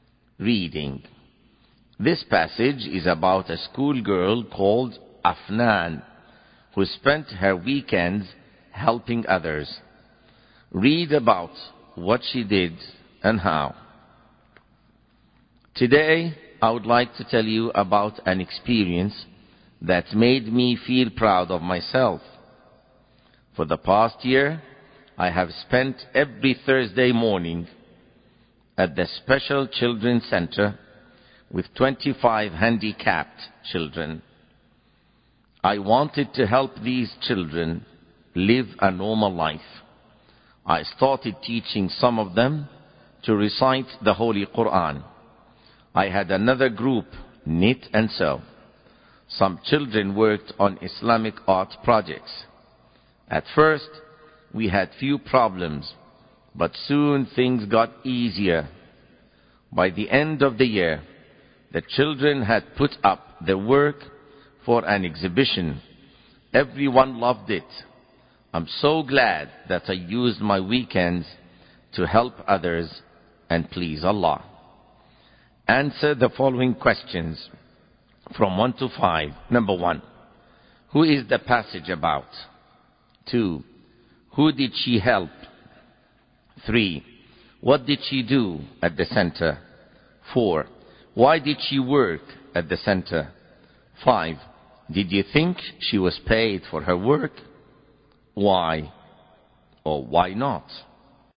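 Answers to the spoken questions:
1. A schoolgirl called Afnan
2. 25 handicapped children at the Special Children's Center
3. She taught them to recite the Holy Quran, knit and sew, and do Islamic art projects
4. To help the children live a normal life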